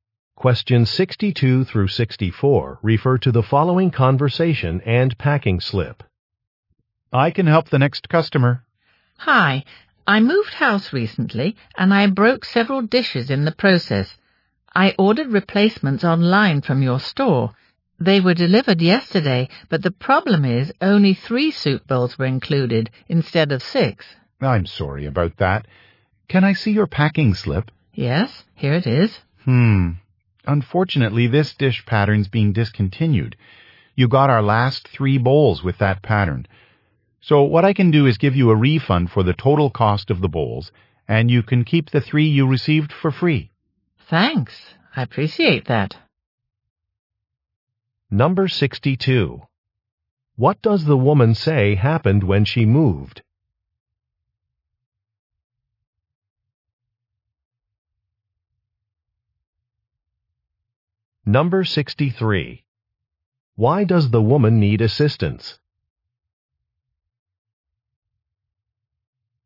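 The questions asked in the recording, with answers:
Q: What does the woman say happened when she moved?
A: She broke several dishes

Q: Why does the woman need assistance?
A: Her order was missing three soup bowls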